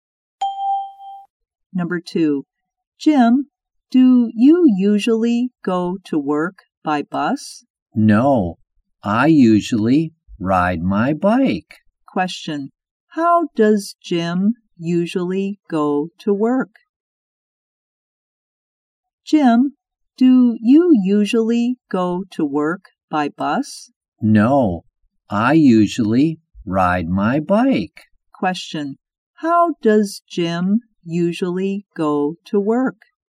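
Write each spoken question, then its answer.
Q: Question, how does Jim usually go to work?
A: By bike.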